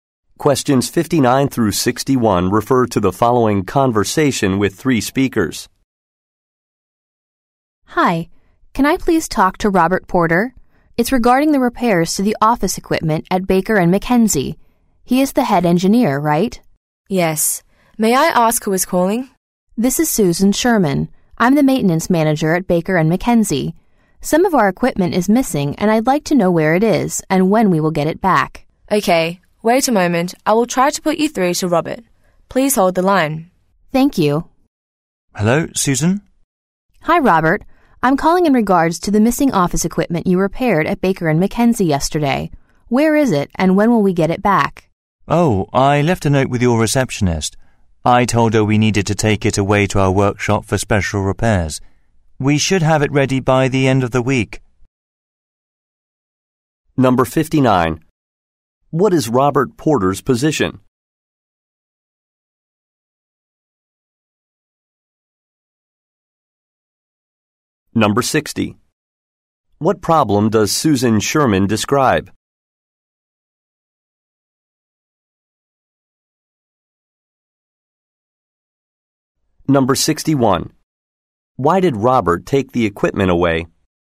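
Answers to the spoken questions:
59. Head engineer
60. Some office equipment is missing
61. To do special repairs at the workshop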